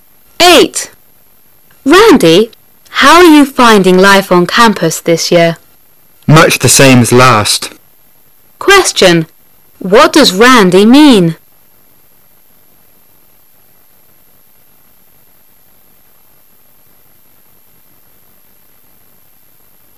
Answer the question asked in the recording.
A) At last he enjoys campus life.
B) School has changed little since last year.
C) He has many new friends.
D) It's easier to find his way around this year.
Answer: B) School has changed little since last year.

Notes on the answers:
B观点与态度题,"...the same...as"指"...与..."一样,可推出B为正确答案。

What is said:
[解析] Woman: Randy, how are you finding life on campus this year? Man: Much the same as last. Question: What does Randy mean?